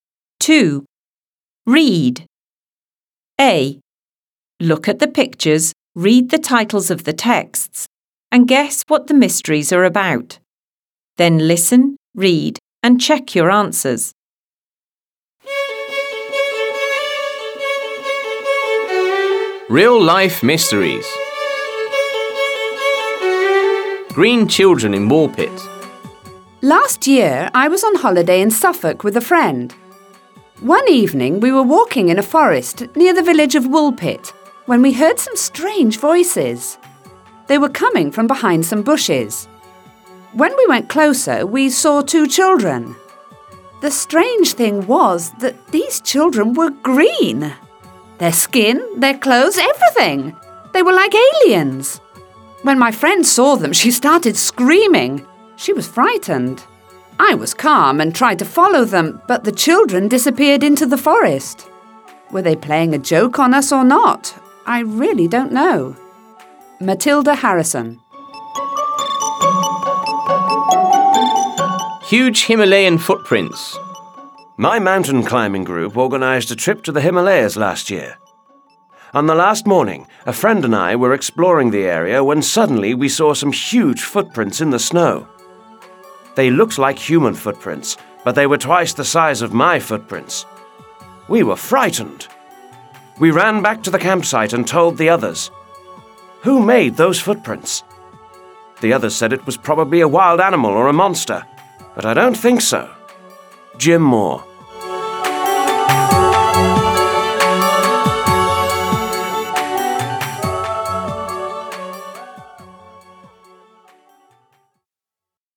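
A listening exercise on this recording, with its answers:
Decide the sentence is True or False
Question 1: Yesterday I was on holiday in Suffolk with a friend.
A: False

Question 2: They were coming from behind some bushes.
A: True

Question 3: When we went closer, we saw twenty children.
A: False

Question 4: The strange thing was that these children were blue!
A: False

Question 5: My mountain climbing group organised a trip to the Himalayas last year!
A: True

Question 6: On the last evening, a friend and I were exploring the area when suddenly we saw some huge footprints in the snow!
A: False

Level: 6 Клас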